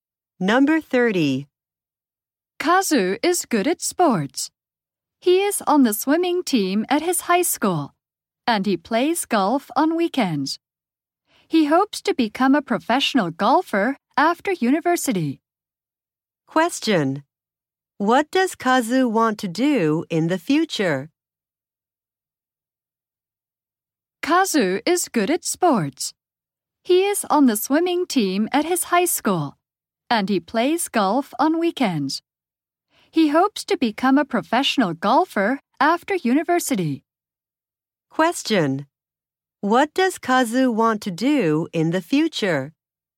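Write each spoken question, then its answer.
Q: What does Kazu want to do in the future?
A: Become a professional golfer.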